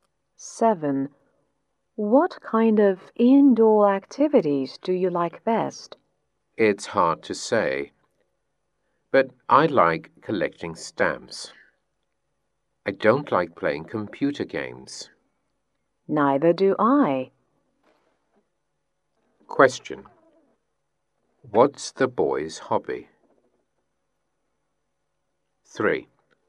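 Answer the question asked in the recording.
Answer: Collecting stamps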